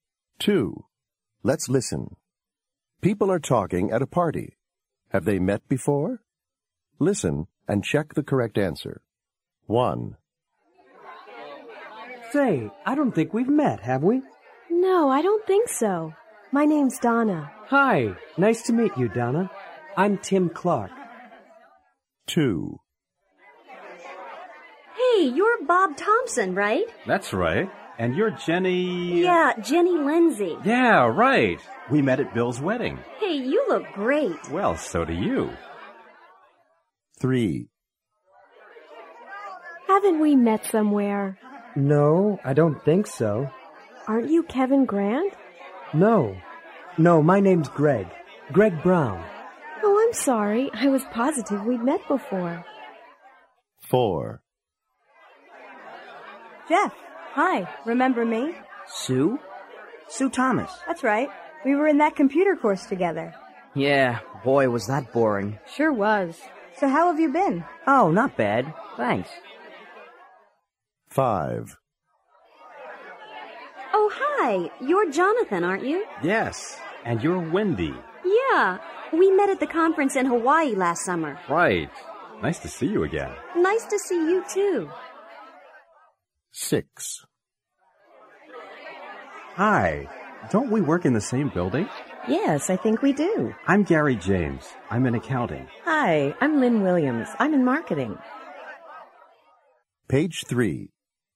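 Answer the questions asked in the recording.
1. No
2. Yes
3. No
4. Yes
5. Yes
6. No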